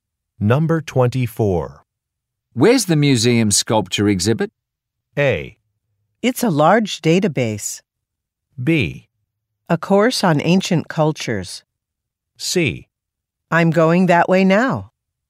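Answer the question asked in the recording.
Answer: C: I'm going that way now.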